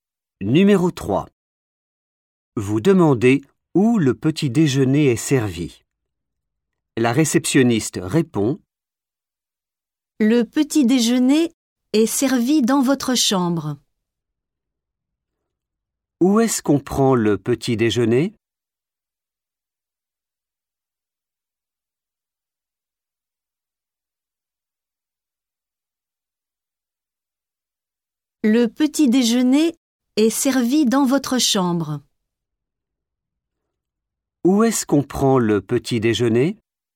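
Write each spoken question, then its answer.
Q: Où est-ce qu'on prend le petit déjeuner?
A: dans votre chambre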